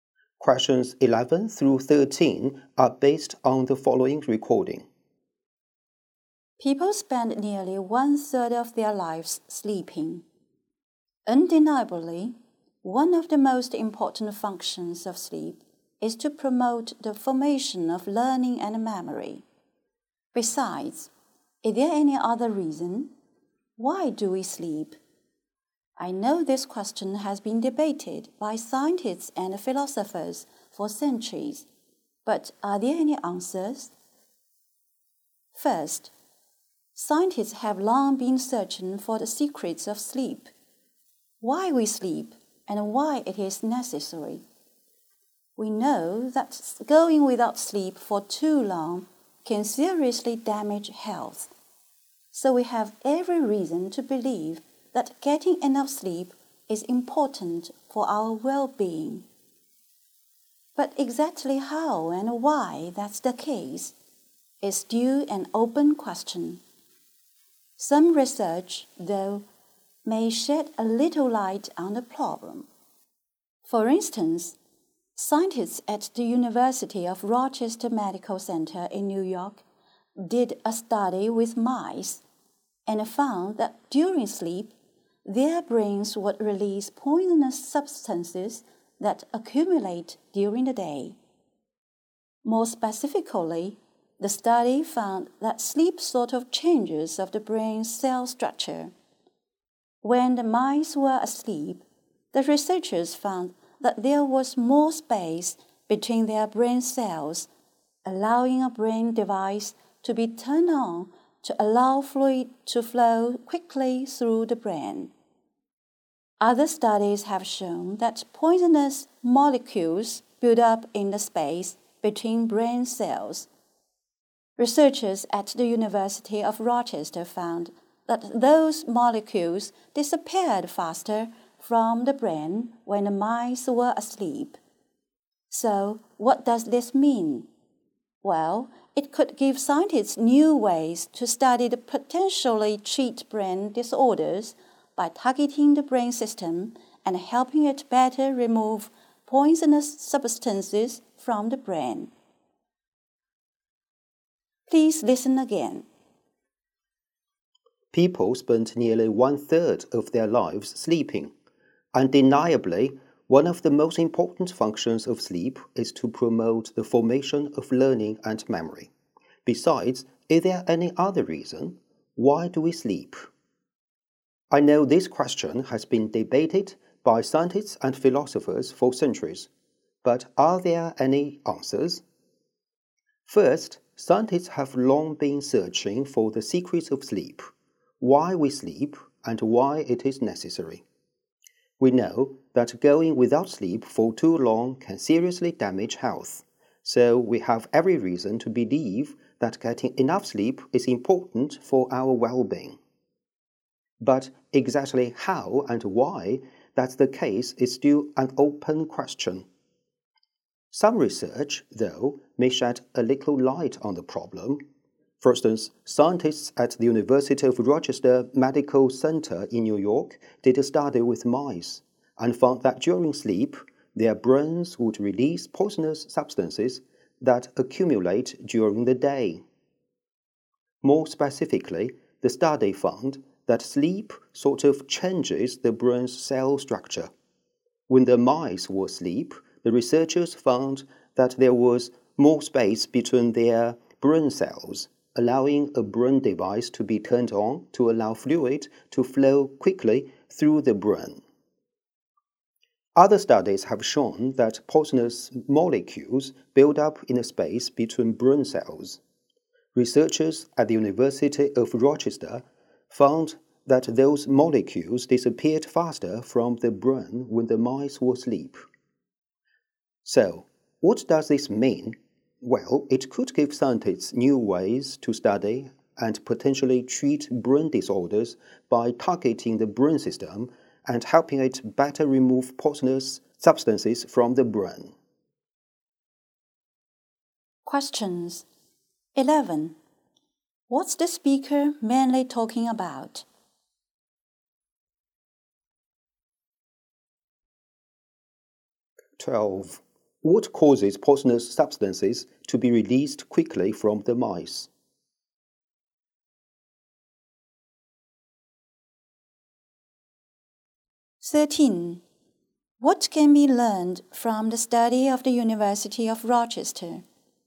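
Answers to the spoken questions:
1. Why we sleep
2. Sleep
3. Sleep helps remove poisonous substances from the brain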